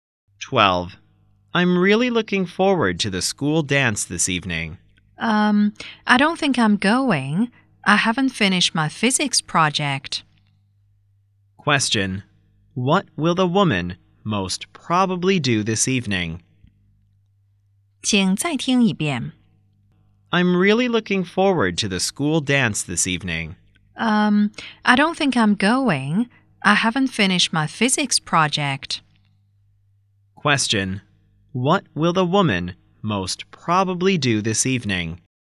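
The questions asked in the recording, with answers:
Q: What will the woman most probably do this evening?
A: Finish her physics project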